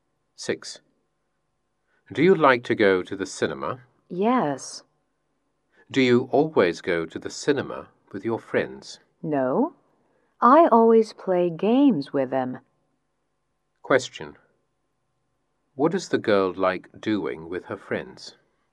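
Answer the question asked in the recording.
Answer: Playing games.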